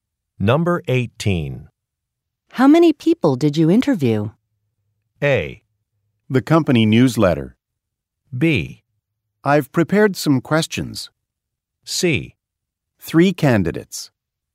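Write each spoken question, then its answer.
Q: How many people did you interview?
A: C: 3 candidates.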